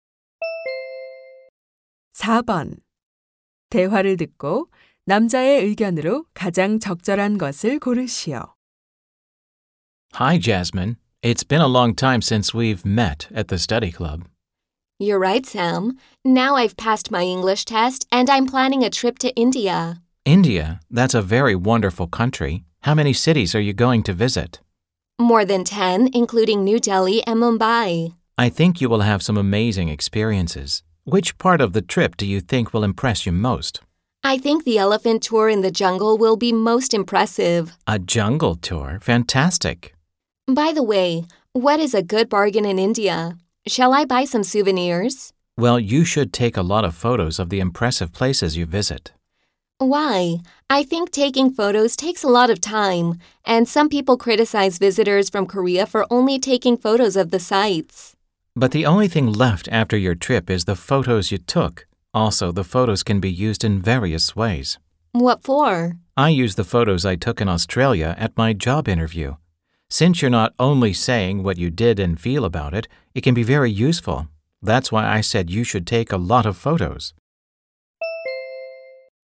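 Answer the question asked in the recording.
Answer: 여행 중에 사진을 많이 찍어야 한다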